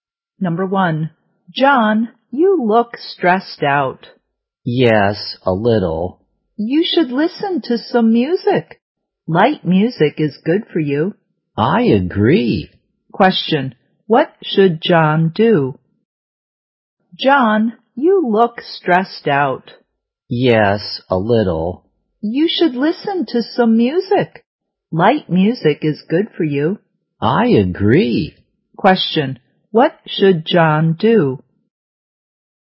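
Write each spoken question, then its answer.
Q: what should John do?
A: Listen to some (light) music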